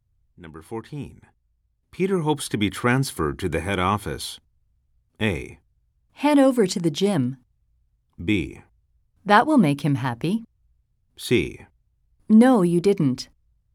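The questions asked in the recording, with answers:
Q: Peter hopes to be transferred to the head office.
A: B: That will make him happy.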